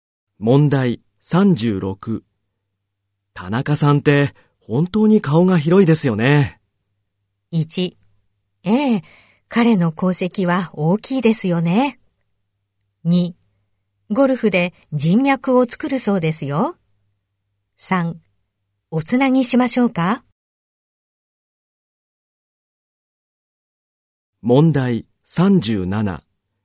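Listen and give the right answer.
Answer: 2: ゴルフで人脈を作るそうですよ。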